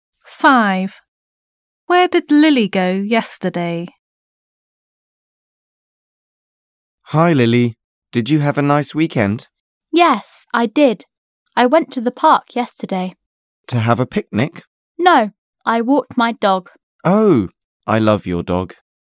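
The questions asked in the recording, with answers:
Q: Where did Lily go yesterday?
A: To the park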